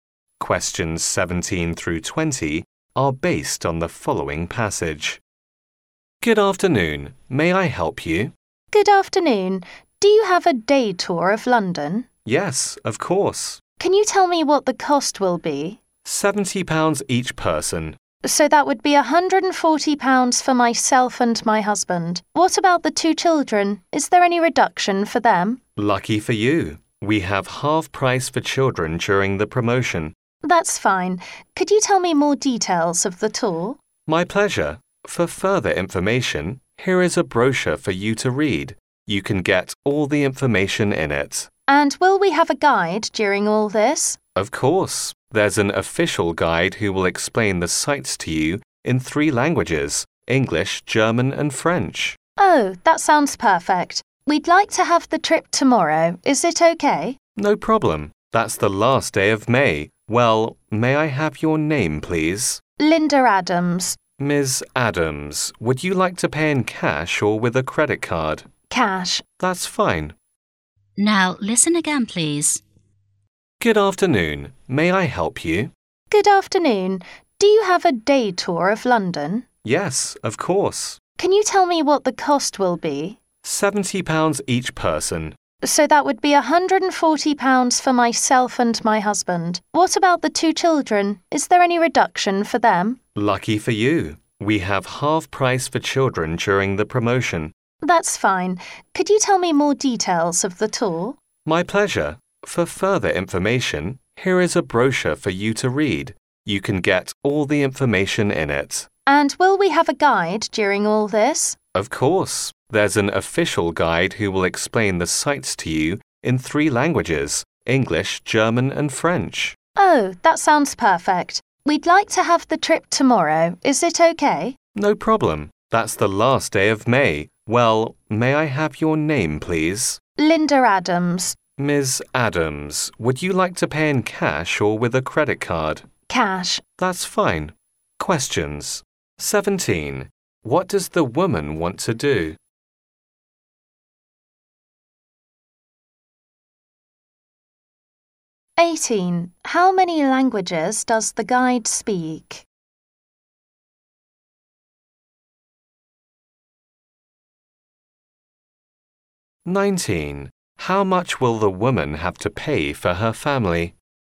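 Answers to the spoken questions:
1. Take a day tour of London
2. Three
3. £210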